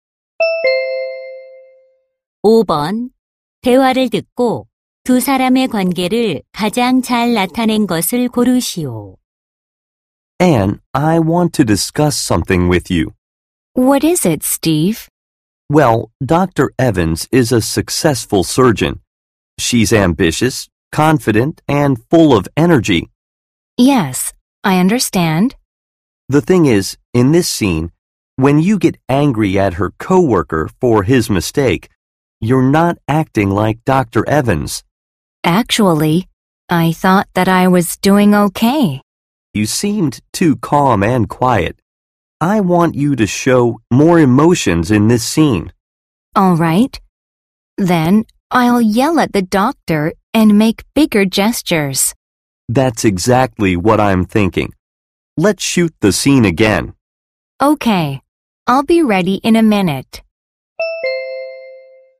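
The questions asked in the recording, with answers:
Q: 대화를 듣고 두 사람의 관계를 가장 잘 나타낸 것을 고르시오.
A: 영화 감독 - 배우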